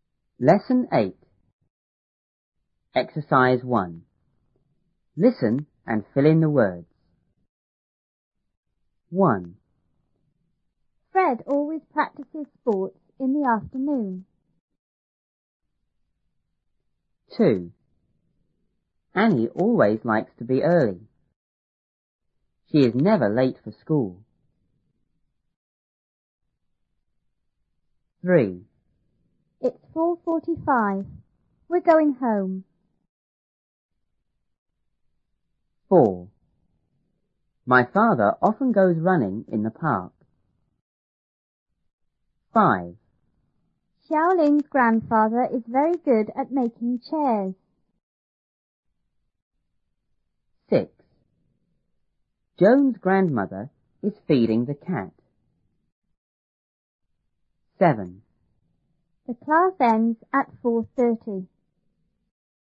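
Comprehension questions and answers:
1.Listen and fill in the words.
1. Fred always ___ sports in the ___ .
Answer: practices, afternoon

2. Annie ___ likes to be early.She is ___ for school.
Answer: always, never late

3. It's ___ We're going home.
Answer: 4:45

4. My father often___ ___in the park.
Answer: goes running

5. Xiaoling's___is very good___making chairs.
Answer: grandfather, at

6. Joan's grandmother is feeding___ ___.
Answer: the cat

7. The class___at___.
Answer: ends, 4:30

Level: 初中英语广州版1B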